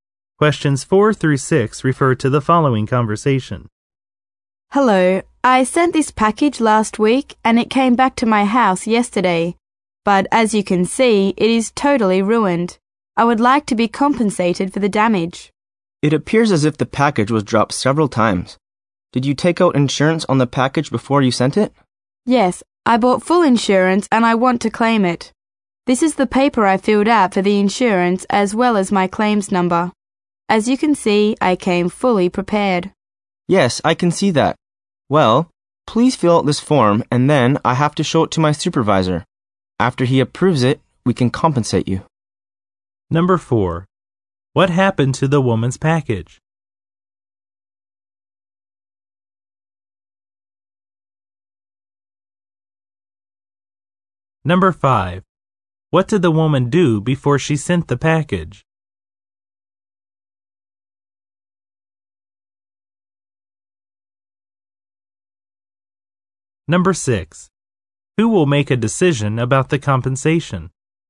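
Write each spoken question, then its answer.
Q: What happened to the woman's package?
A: It came back damaged

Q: What did the woman do before she sent the package?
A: She bought full insurance

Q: Who will make a decision about the compensation?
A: The supervisor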